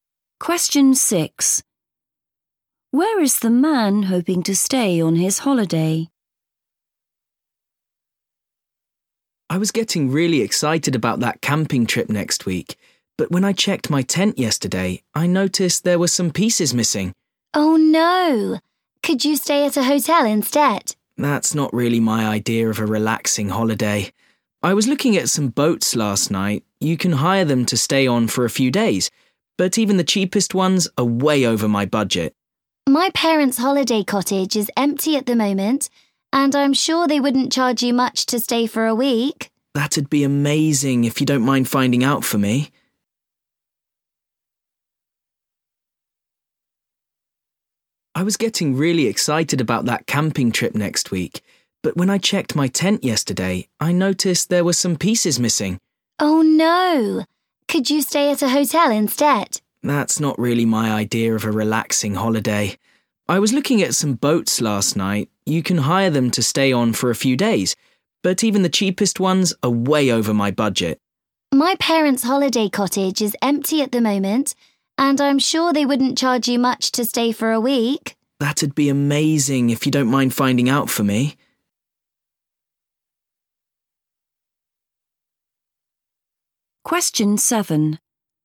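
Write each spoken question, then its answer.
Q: Where is the man hoping to stay on his holiday?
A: In his friend's parents' holiday cottage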